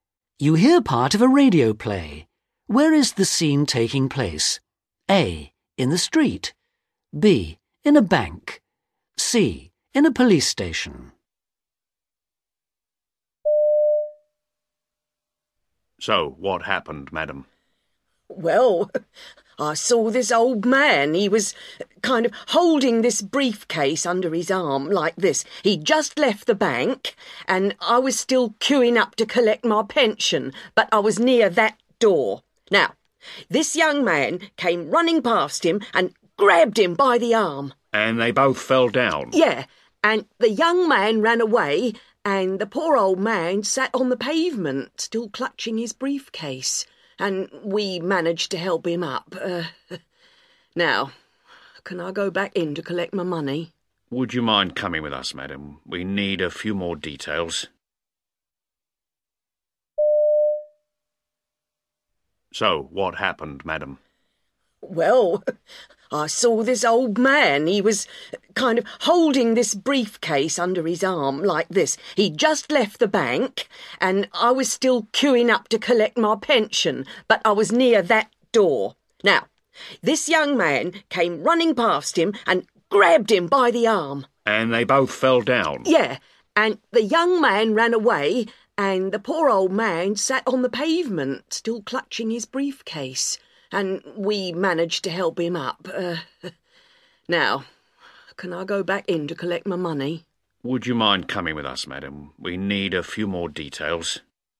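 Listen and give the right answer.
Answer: A: In the street.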